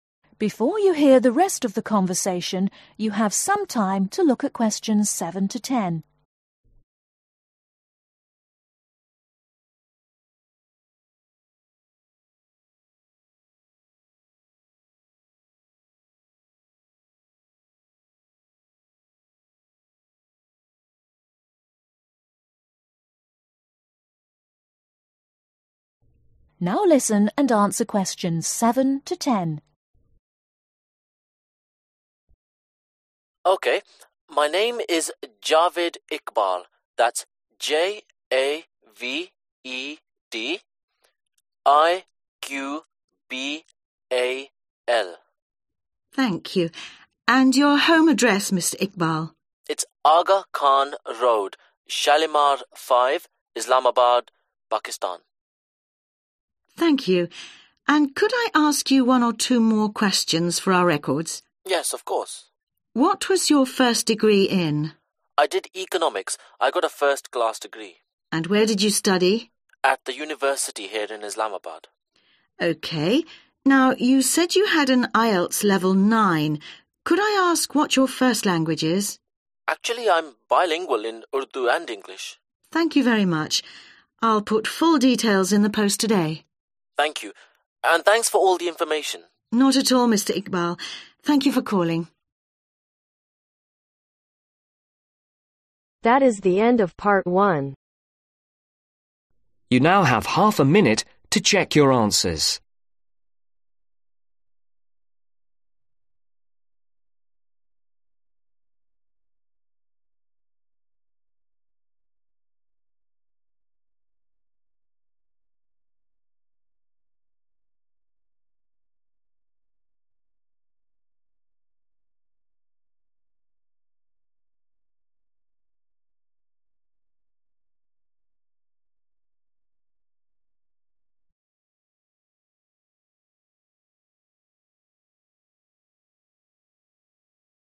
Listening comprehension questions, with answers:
Complete the form below.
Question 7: Home address : Aga Khan Road , Shalimar (7)............ , Islamabad , Pakistan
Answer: 5

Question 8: Subject : (8)............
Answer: Economics

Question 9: Class : (9)............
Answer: First

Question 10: First language / S : Urdu and (10)............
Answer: English